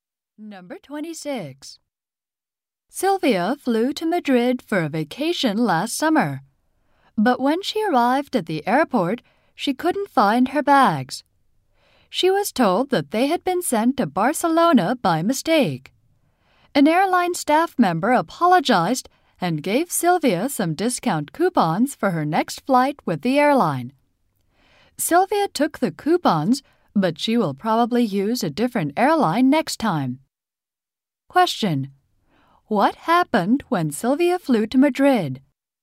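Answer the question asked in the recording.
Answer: Her bags were sent to Barcelona by mistake.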